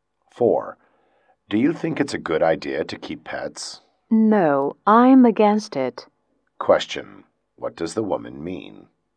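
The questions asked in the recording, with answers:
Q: What does the woman mean?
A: She is against keeping pets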